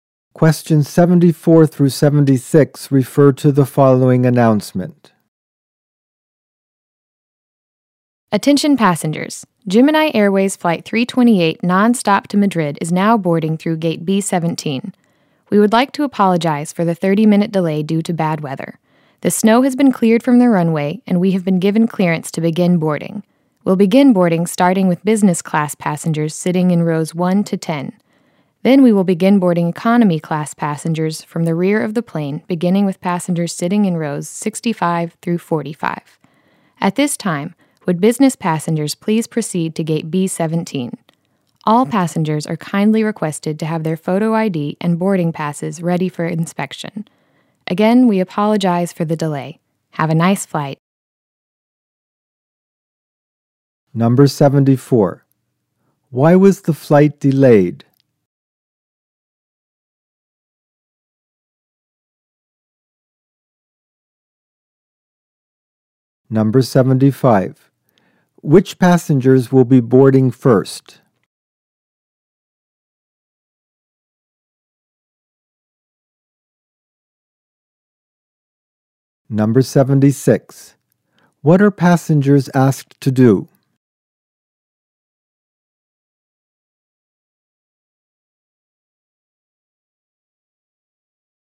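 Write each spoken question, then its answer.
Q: Why was the flight delayed?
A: Bad weather (snow)

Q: Which passengers will be boarding first?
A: Business class passengers in rows 1 to 10

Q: What are passengers asked to do?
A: Have photo ID and boarding passes ready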